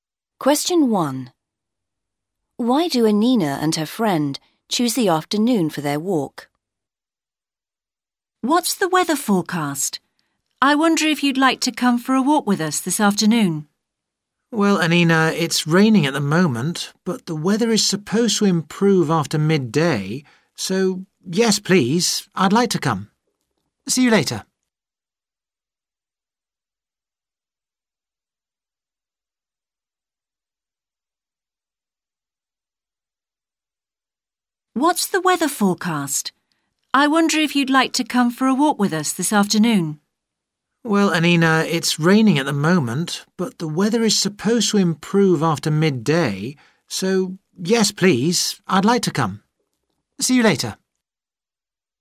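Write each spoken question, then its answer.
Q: Why do Anina and her friend choose the afternoon for their walk?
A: The weather is supposed to improve after midday (it is raining now)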